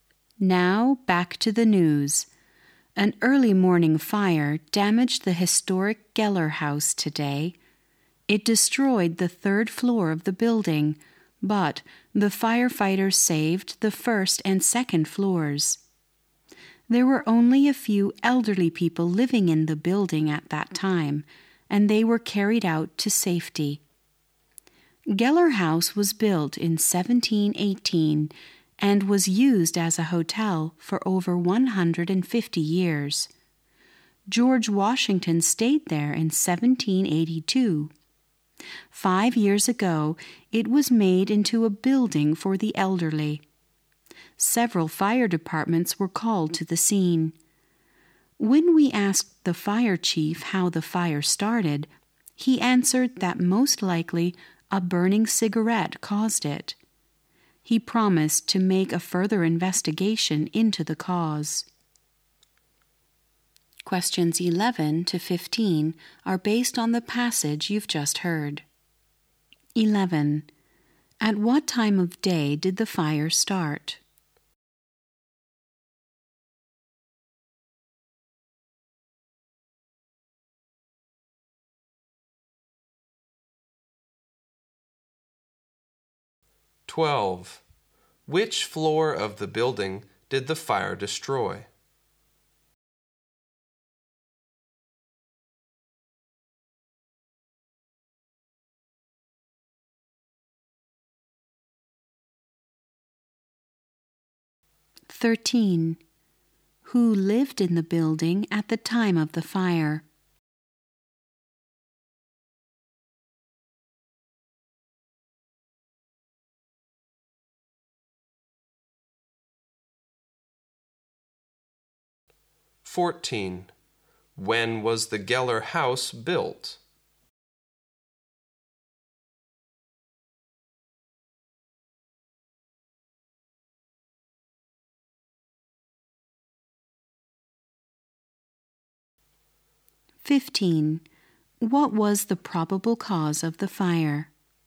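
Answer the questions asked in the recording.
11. Early morning
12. The third floor
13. A few elderly people
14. In 1718
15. A burning cigarette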